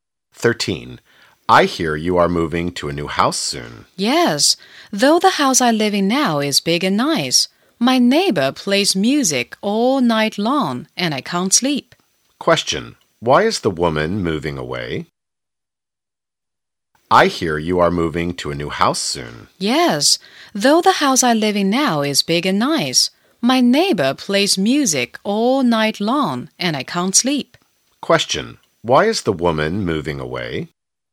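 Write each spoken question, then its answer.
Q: Why is the woman moving away?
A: Her neighbor plays music all night and she can't sleep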